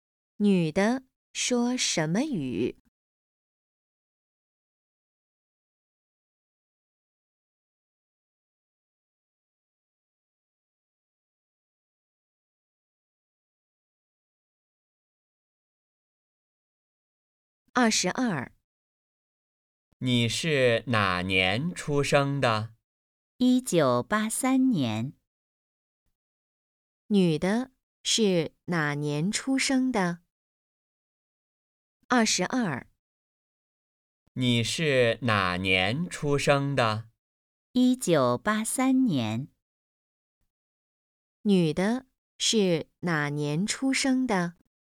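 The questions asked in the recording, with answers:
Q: 女的是哪年出生的?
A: 1983年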